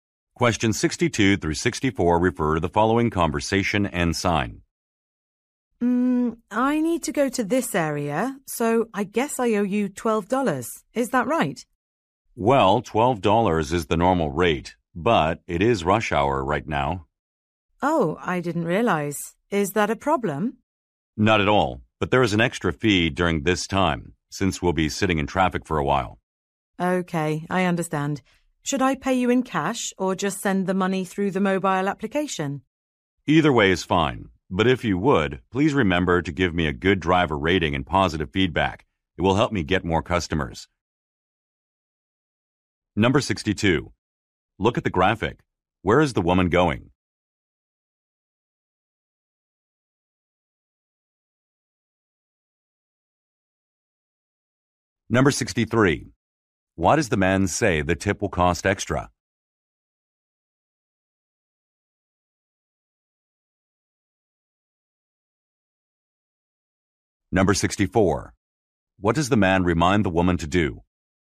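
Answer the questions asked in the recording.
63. Because it is rush hour
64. Give him a good driver rating and positive feedback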